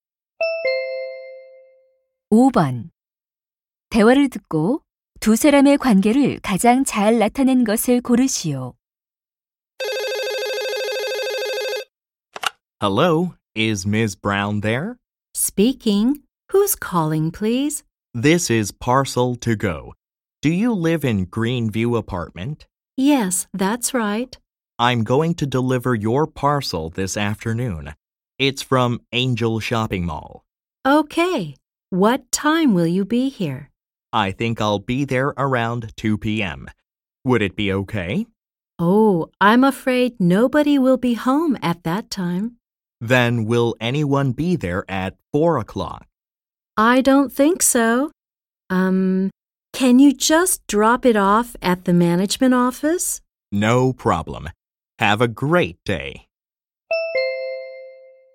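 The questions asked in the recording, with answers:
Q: 대화를 듣고 두 사람의 관계를 가장 잘 나타낸 것을 고르시오.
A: 택배 기사 - 고객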